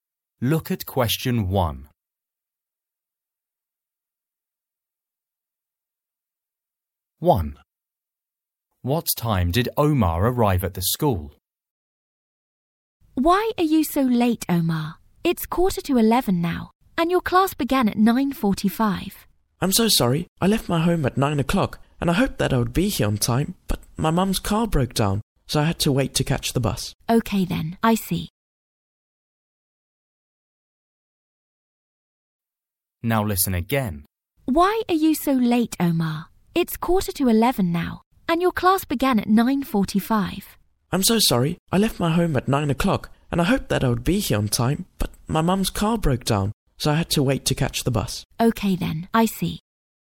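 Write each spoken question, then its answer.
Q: What time did Omar arrive at the school?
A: 10:45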